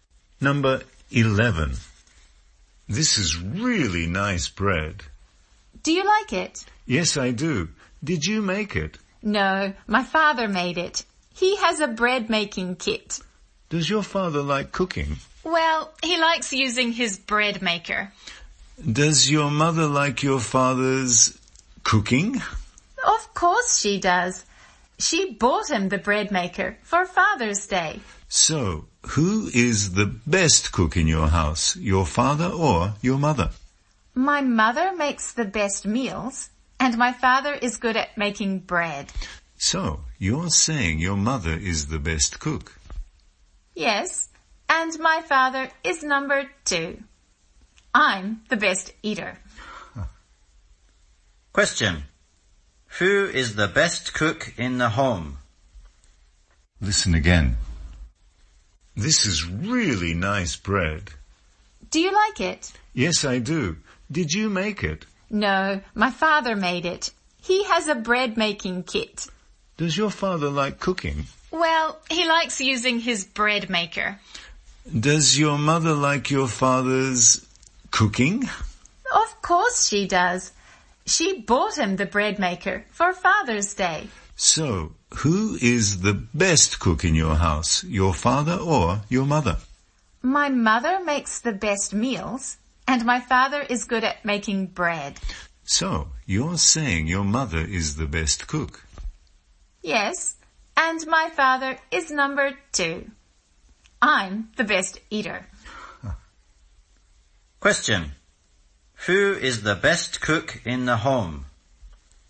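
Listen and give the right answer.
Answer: The mother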